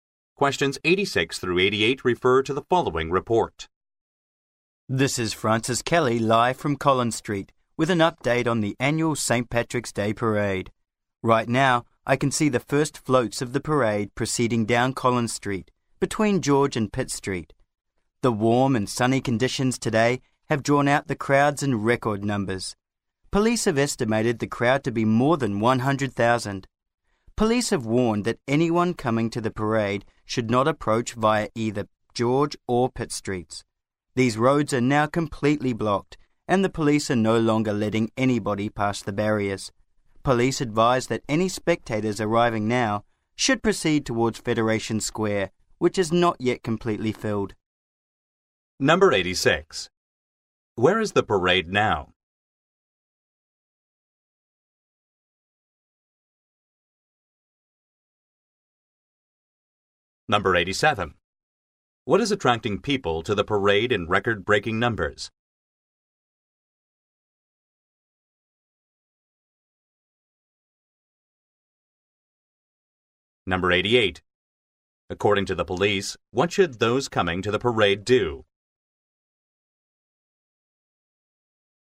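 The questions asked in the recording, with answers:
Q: Where is the parade now?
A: On Collins Street between George and Pitt Street

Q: What is attracting people to the parade in record-breaking numbers?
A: The warm and sunny weather

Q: According to the police, what should those coming to the parade do?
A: Go towards Federation Square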